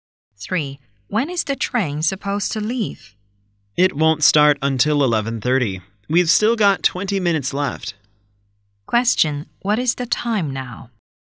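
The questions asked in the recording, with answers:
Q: What is the time now?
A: 11:10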